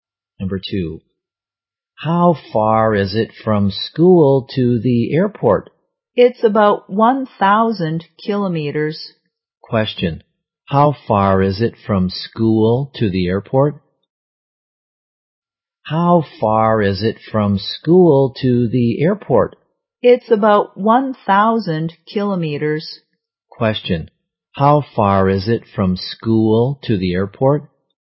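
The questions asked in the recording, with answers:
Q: Question, how far is it from school to the airport?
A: About 1,000 kilometers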